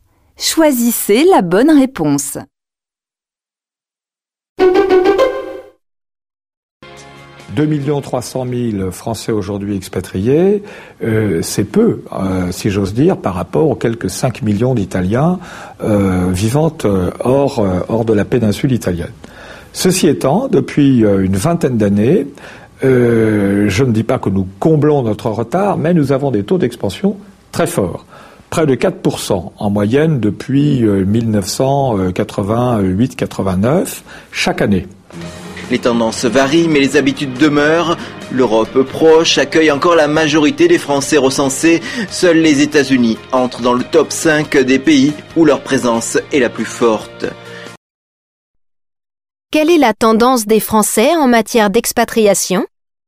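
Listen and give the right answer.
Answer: Elle augmente fortement : près de 4 % de plus par an depuis 1988-89, surtout vers l'Europe proche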